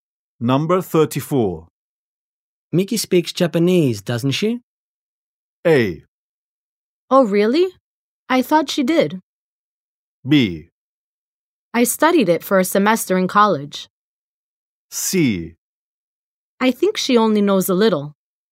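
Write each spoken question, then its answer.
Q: Miki speaks Japanese, doesn't she?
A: C: I think she only knows a little.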